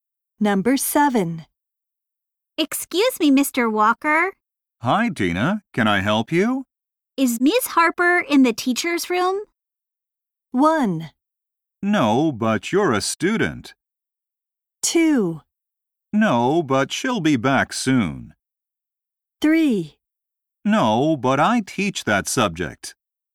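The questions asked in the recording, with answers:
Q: Is Ms. Harper in the teacher's room?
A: 2: No, but she'll be back soon.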